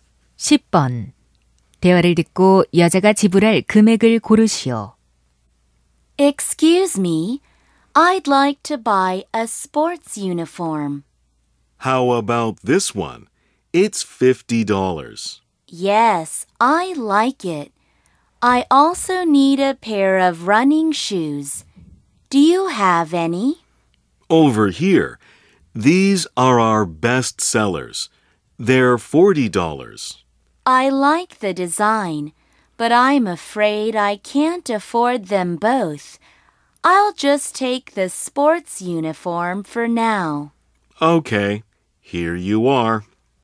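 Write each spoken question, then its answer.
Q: 대화를 듣고 여자가 지불할 금액을 고르시오.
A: $50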